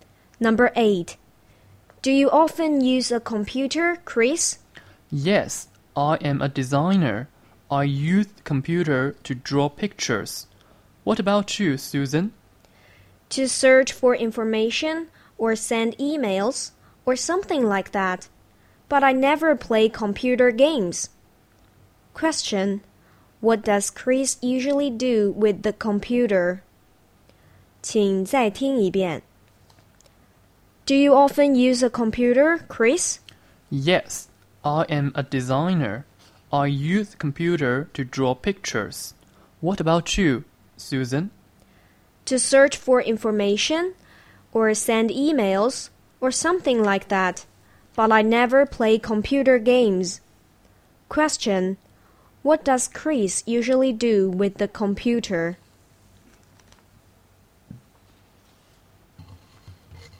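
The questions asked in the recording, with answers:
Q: What does Chris usually do with the computer?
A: He draws pictures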